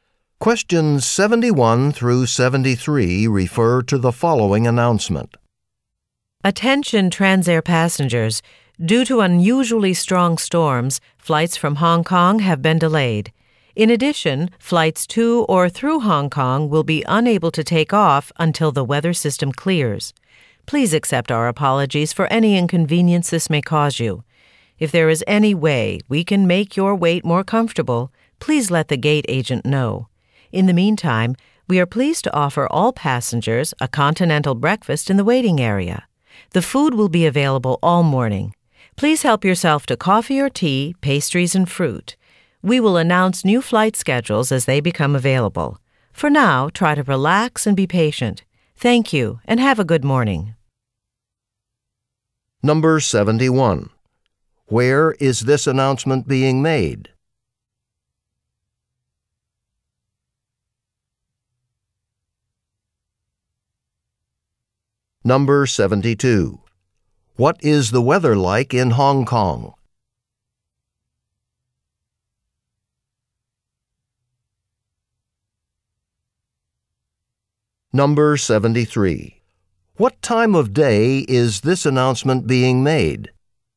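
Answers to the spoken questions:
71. At an airport
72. Stormy
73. In the morning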